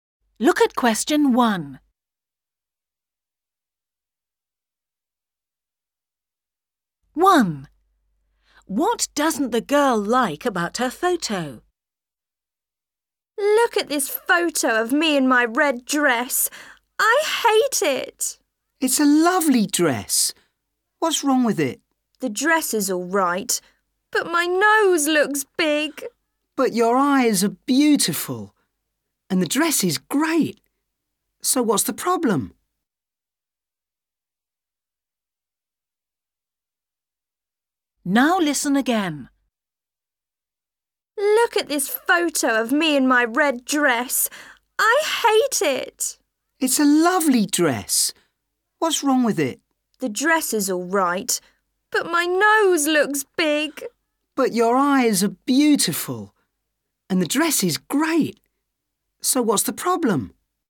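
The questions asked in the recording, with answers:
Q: What doesn't the girl like about her photo?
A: her nose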